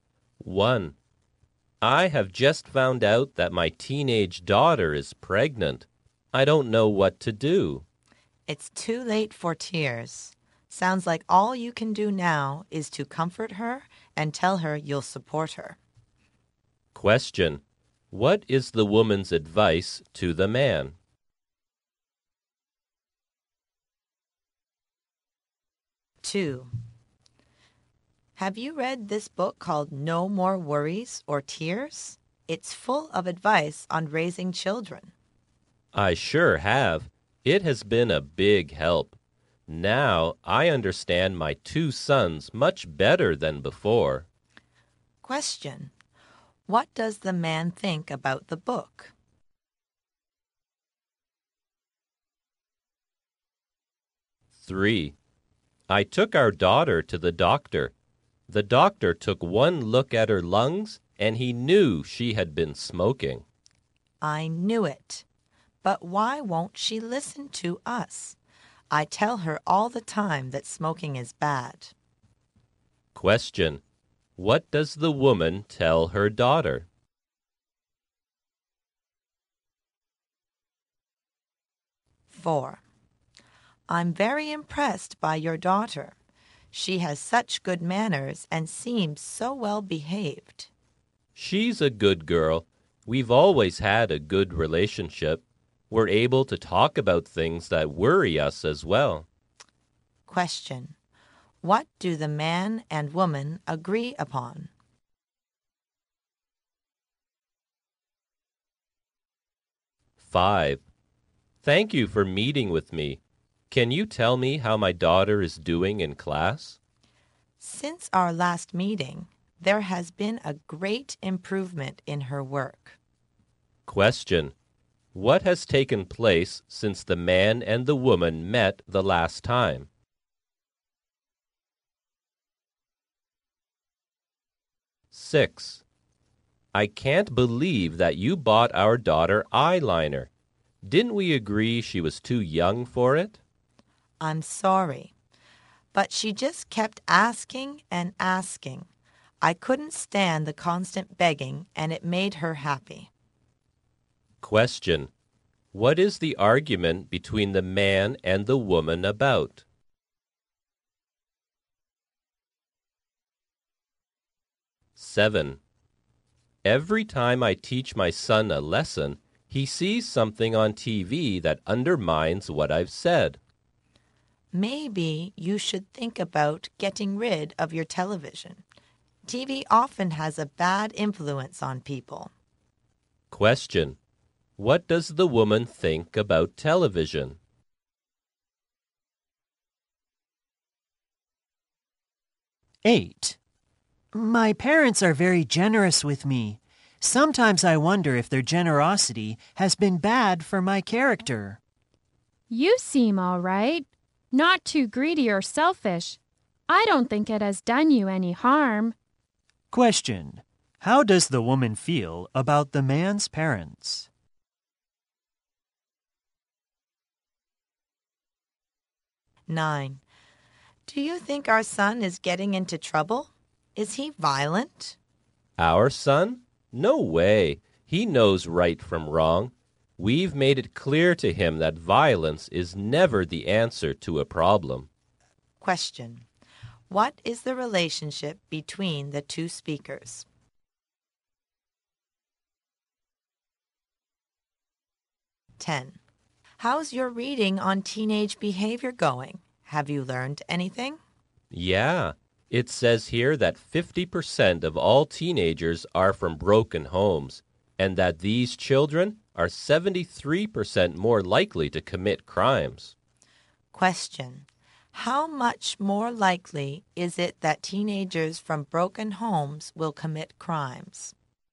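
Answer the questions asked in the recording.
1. Comfort his daughter and tell her he'll support her
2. It has been a big help in understanding his sons
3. That smoking is bad
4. The daughter is a good, well-behaved girl
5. The daughter's work has greatly improved
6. Buying their daughter eyeliner
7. It often has a bad influence on people
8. Their generosity hasn't harmed him
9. Husband and wife (parents)
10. 73% more likely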